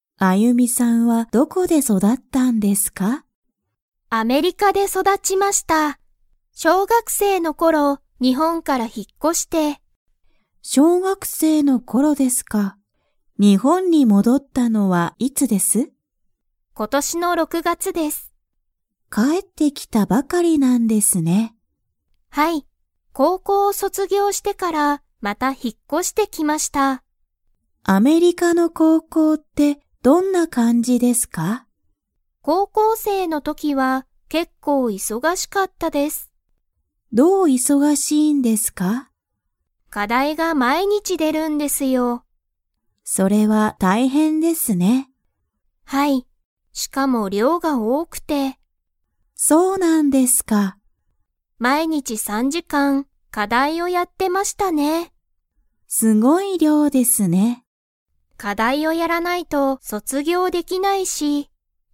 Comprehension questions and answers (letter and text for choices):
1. アユミは、いつ日本にほんからアメリカに引ひっ越こしましたか?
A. 今年ことしの6ろく月がつ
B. 高校こうこうを卒業そつぎょうしてから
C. 小学生しょうがくせいの頃ころ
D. 高校生こうこうせいの時とき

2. アユミは高校生こうこうせいの時とき、 。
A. 忙いそがしかった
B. 忙いそがしくなかった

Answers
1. C. 小学生しょうがくせいの頃ころ
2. A. 忙いそがしかった

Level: Level 4